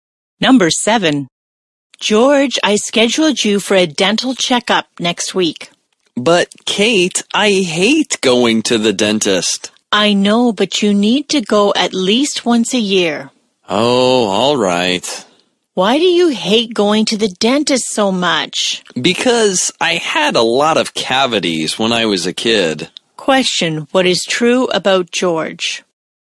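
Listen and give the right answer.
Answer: He hates going to the dentist because he had many cavities as a kid.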